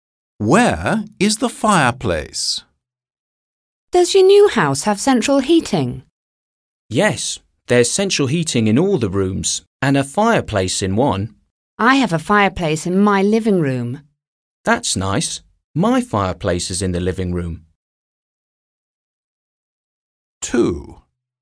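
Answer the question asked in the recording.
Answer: In the living room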